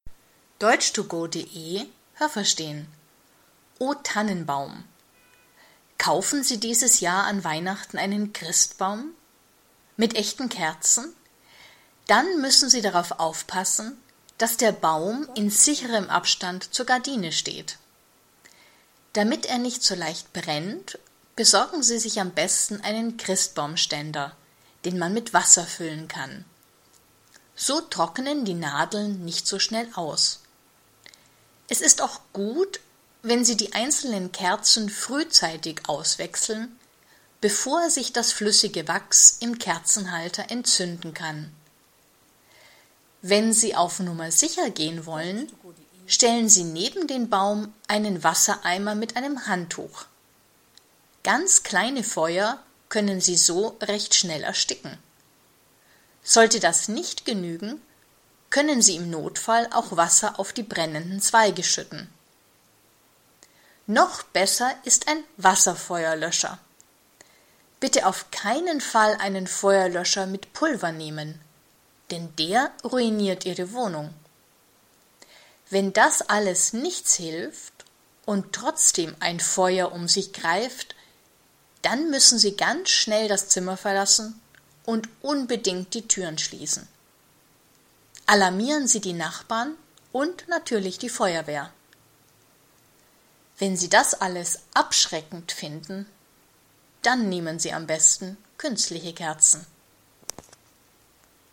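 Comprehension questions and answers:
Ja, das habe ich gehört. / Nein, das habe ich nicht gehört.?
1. Hat man einen Weihnachtsbaum mit echten Kerzen, dann sollen in diesem Zimmer keine Gardinen hängen.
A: Nein, das habe ich nicht gehört.

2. Mit einem Christbaumständer brennt ein Baum nicht so leicht.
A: Nein, das habe ich nicht gehört.

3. Wenn das Wachs flüssig ist, kann es im Kerzenhalter anfangen zu brennen.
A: Ja, das habe ich gehört.

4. Schon bei ganz kleinen Feuern muss man immer Wasser auf die brennenden Zweige schütten.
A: Nein, das habe ich nicht gehört.

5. Egal welchen Feuerlöscher man benutzt, die Wohnung ist anschließend immer ruiniert.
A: Nein, das habe ich nicht gehört.

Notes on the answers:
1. Im Zimmer dürfen Gardinen sein, aber der Baum sollte nicht zu nah bei den Gardinen stehen.
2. Ein Christbaumständer alleine hilft nicht. Man braucht einen, den man mit Wasser füllen kann. 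(Es gibt auch Christbaumständer, die man nicht mit Wasser füllen kann.)
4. Ein ganz kleines Feuer kann man schon mit einem nassen Handtuch ersticken,

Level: C1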